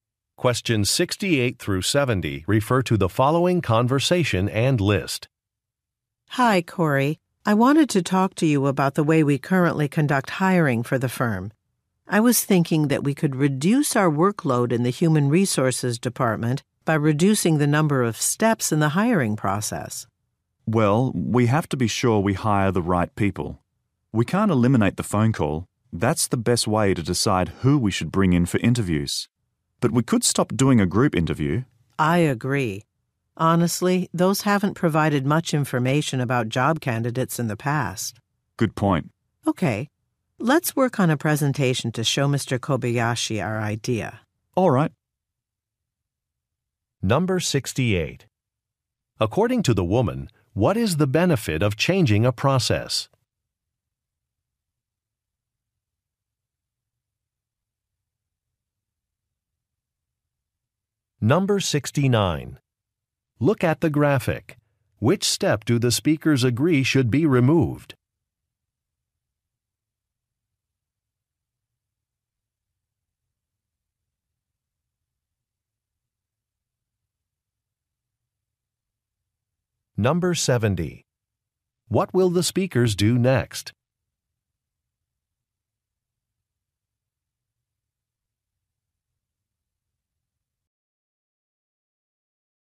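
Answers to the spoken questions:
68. It would reduce the workload
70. Work on a presentation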